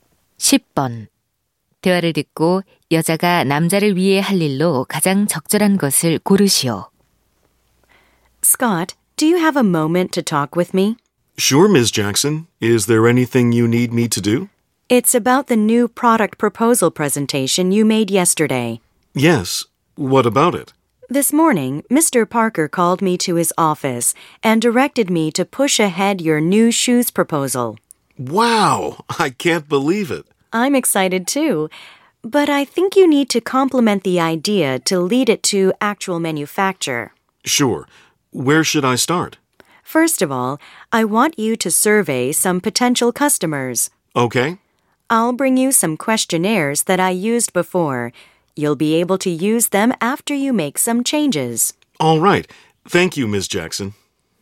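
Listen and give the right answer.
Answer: 예전에 사용했던 설문지 가져다주기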